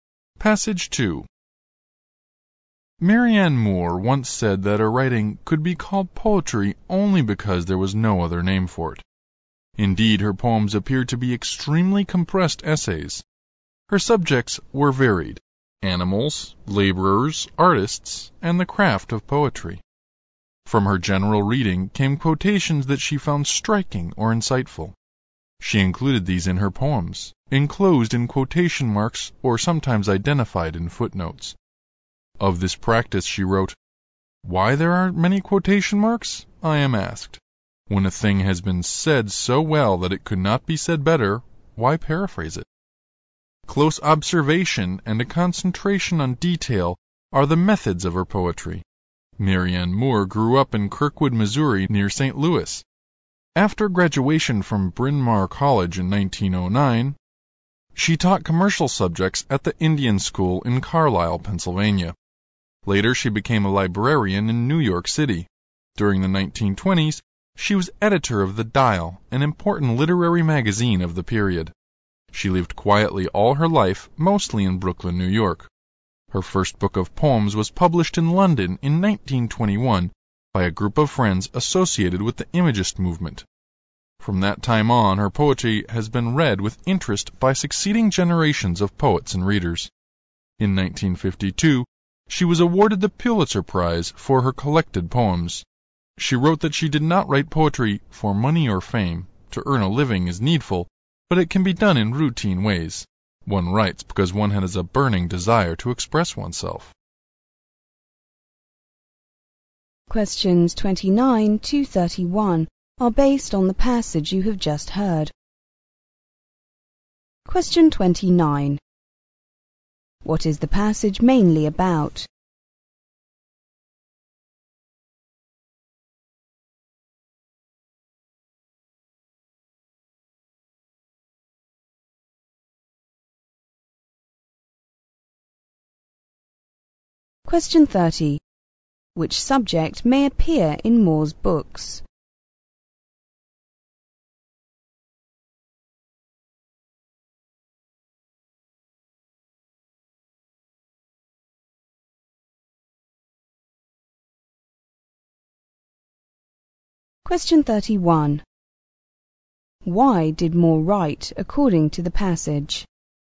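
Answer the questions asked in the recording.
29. The poet Marianne Moore's life and poetry
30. Animals, laborers, artists, or the craft of poetry
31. Out of a burning desire to express herself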